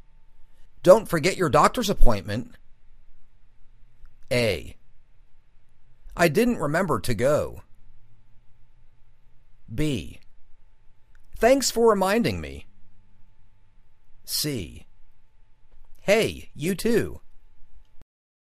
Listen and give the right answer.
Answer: Thanks for reminding me.